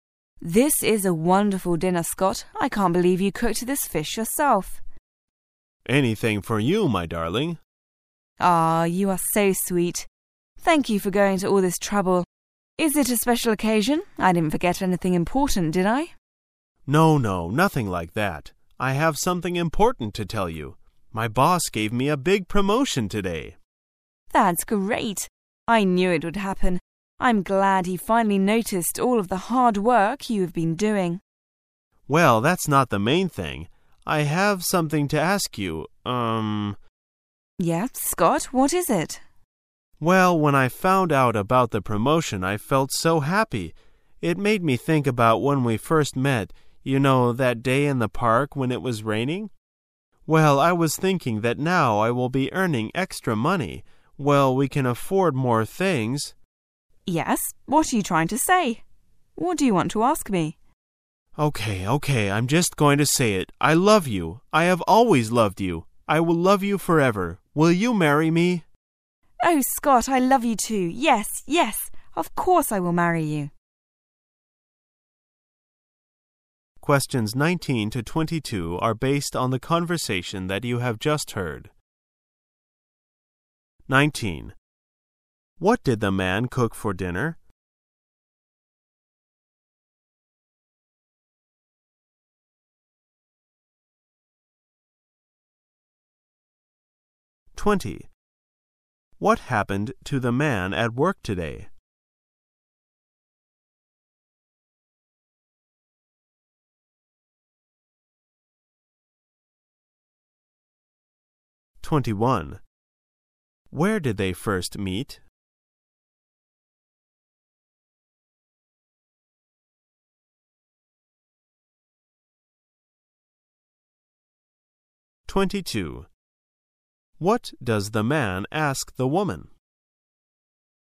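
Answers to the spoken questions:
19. Fish
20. He got a big promotion
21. In the park
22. To marry him

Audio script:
[解析] 19-22 W: This is a wonderful dinner, Scott. I can't believe you cooked this fish yourself! M: Anything for you, my darling. You are so sweet. Thank you for going to all this trouble. Is it a special occasion? I didn't forget something important, did I? M: No, no. Nothing like that. I have something important to tell you.., my boss gave me a big promotion today. W: That's great! I knew it would happen. I'm glad he finally noticed all of the hard work you have been doing. M: Well, that's not the main thing. I have something to ask you.., erm... W: Yes, Scott? What is it? M: Well, when I found out about the promotion I felt so happy. It made me think about when we first met, you know, that day in the park when it was raining? Well, I was thinking that now I will be earning extra money, well, we can afford more things... 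W: Yes, what are you trying to say? What do you want to ask me? I'm going to just say it! I love you, I have always loved you, I will love you forever. I love you too! Yes! Yes! Of course I will marry you!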